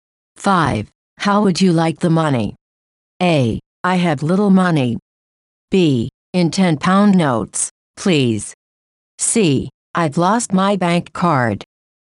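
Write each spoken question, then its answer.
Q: How would you like the money?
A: B: In 10 pound notes, please.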